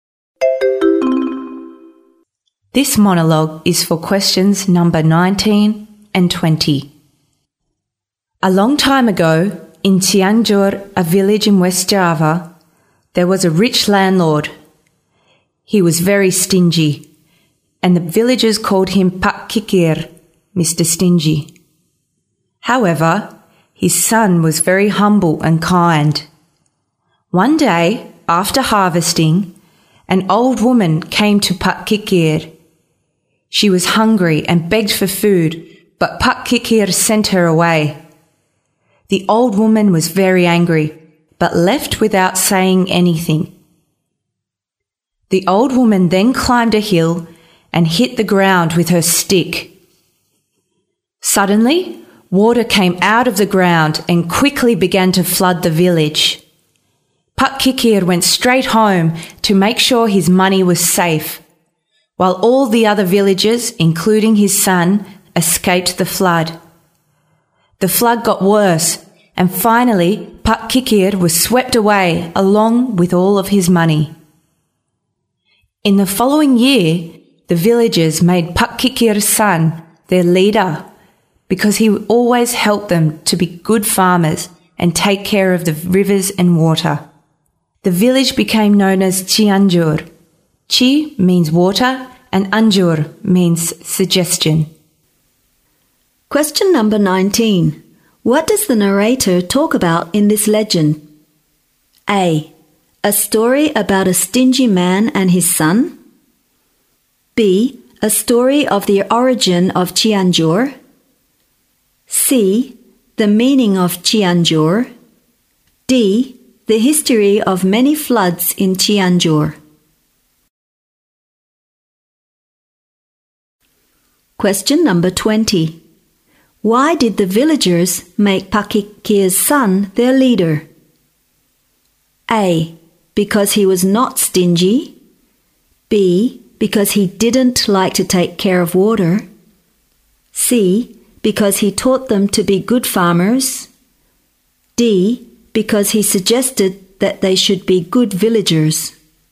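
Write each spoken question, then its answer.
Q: What does the narrator talk about in this legend?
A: B: A story of the origin of Cianjur.

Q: Why did the villagers make Pak Kikir's son their leader?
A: C: Because he taught them to be good farmers.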